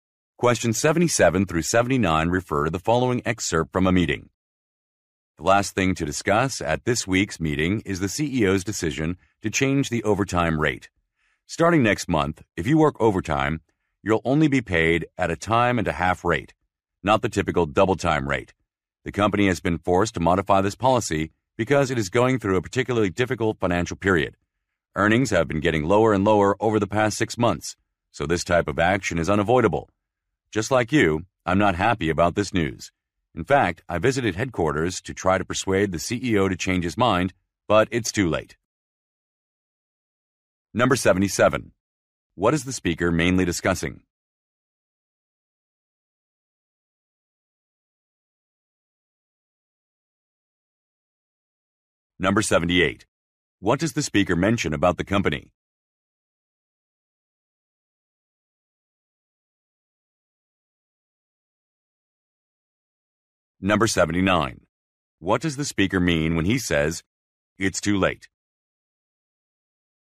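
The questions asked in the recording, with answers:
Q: What is the speaker mainly discussing?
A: A change to the overtime pay rate

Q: What does the speaker mention about the company?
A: It is having financial difficulties; earnings have fallen

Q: What does the speaker mean when he says, "It's too late"?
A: The CEO's decision can't be changed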